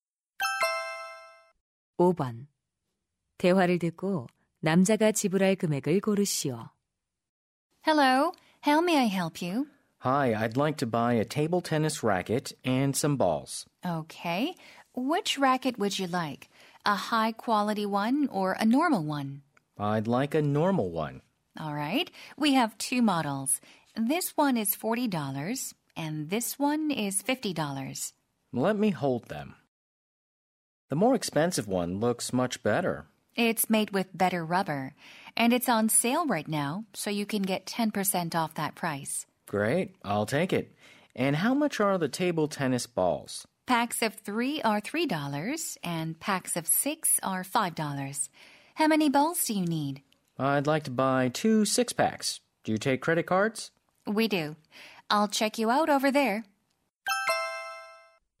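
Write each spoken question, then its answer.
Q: 대화를 듣고 남자가 지불할 금액을 고르시오.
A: 55달러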